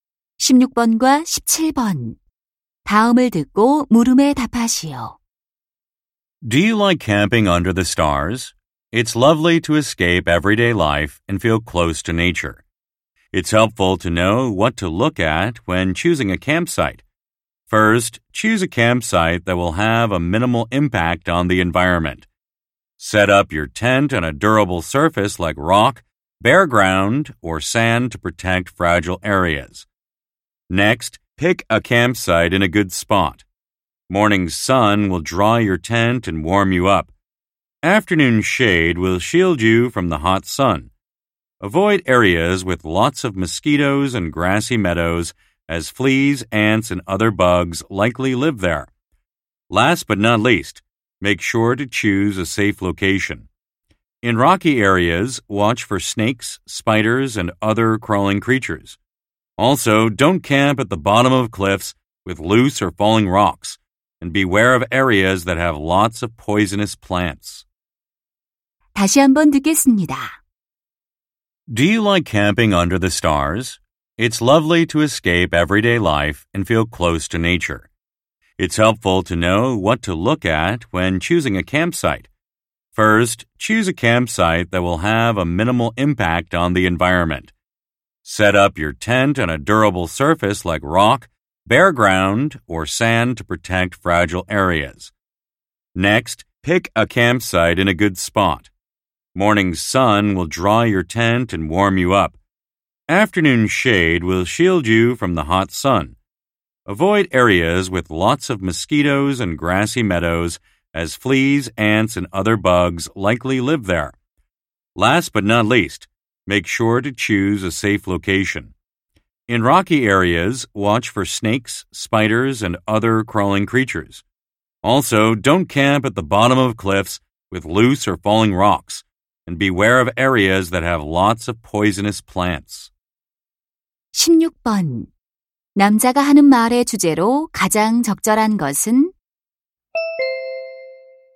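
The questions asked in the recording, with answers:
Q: 남자가 하는 말의 주제로 가장 적절한 것은?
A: 캠핑장 선택 요령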